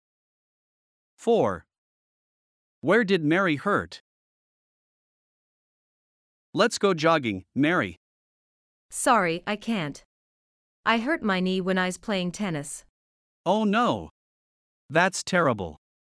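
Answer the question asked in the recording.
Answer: Her knee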